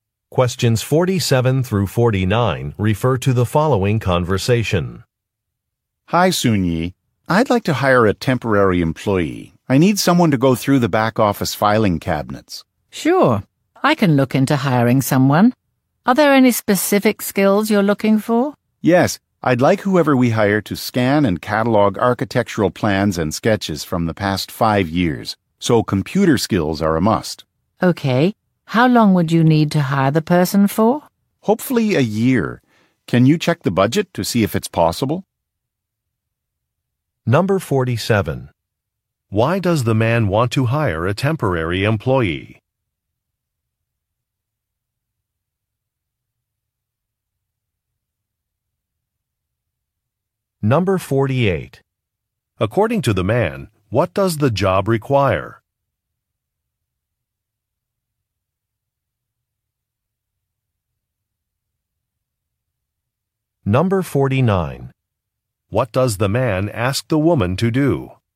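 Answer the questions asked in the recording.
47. To go through the back office filing cabinets (scan and catalog old plans)
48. Computer skills
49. Check the budget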